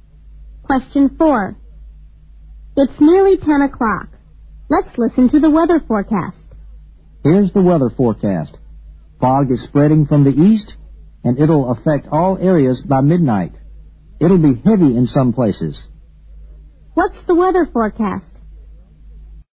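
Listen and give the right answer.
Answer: Fog spreading from the east, reaching all areas by midnight, heavy in places.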